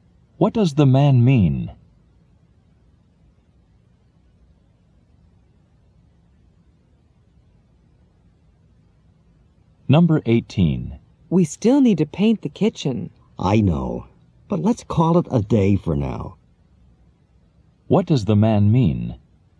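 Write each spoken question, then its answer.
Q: What does the man mean?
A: They should stop working for today and paint the kitchen later.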